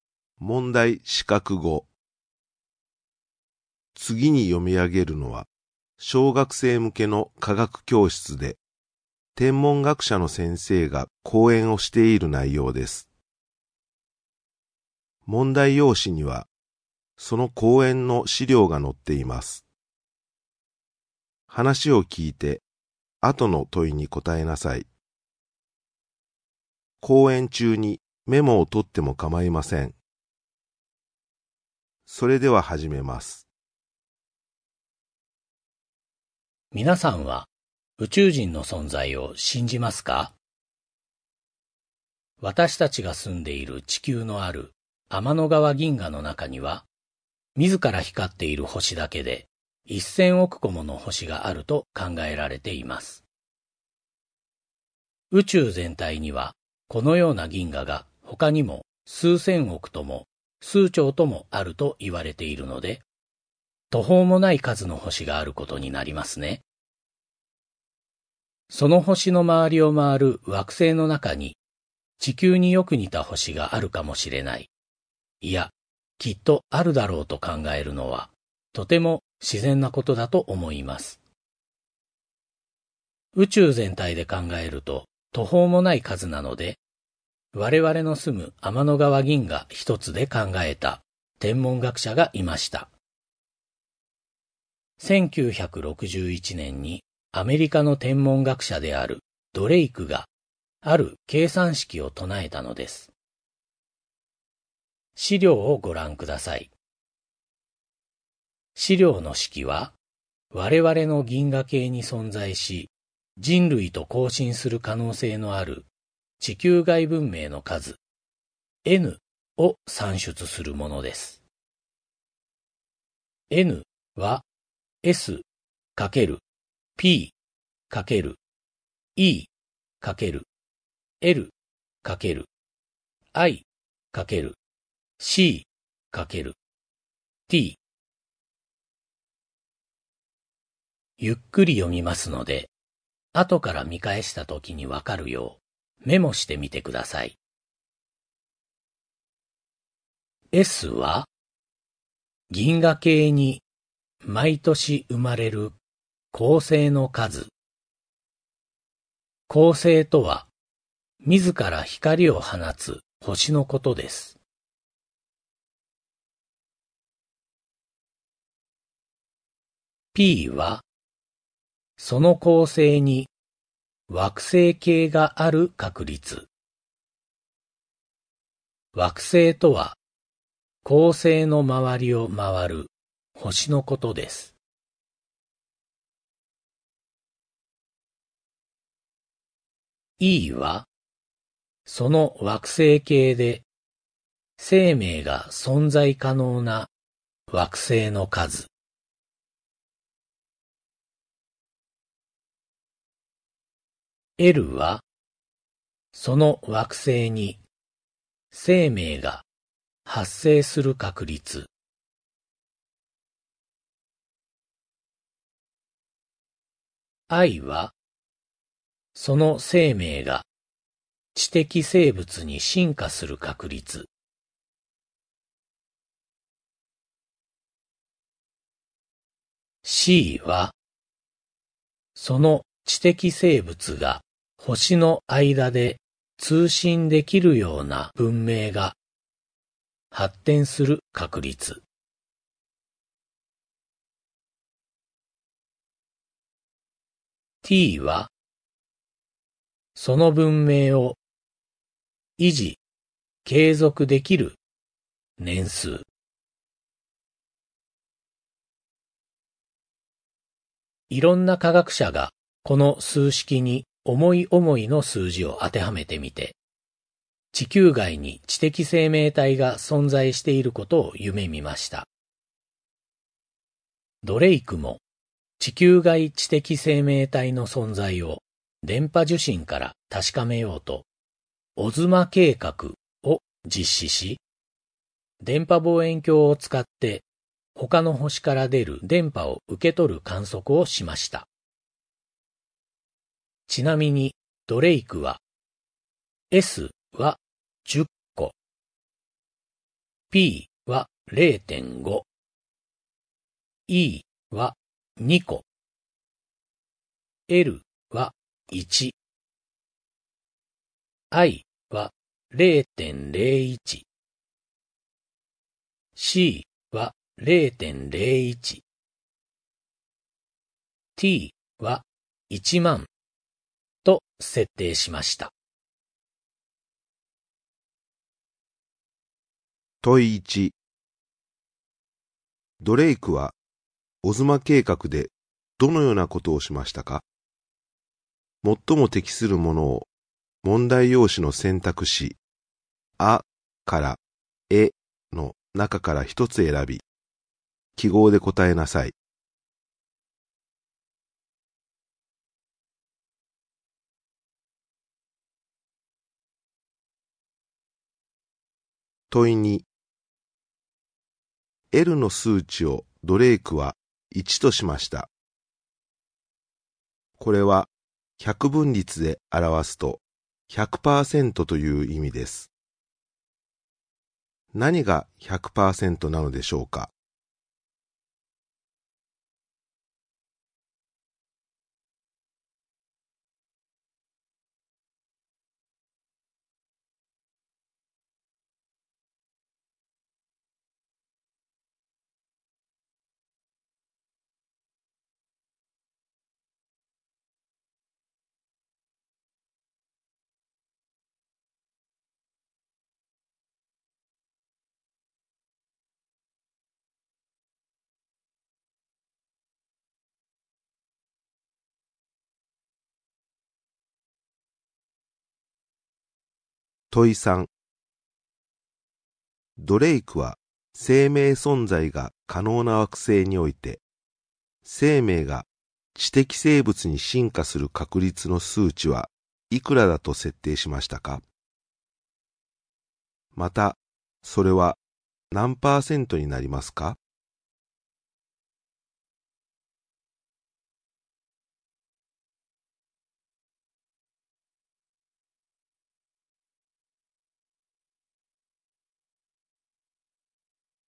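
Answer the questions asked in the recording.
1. その惑星に生命が発生する確率
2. 0.01(1パーセント)
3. 10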